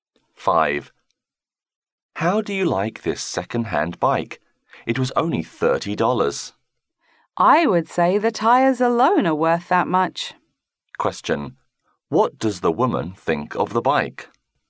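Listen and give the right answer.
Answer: It is a bargain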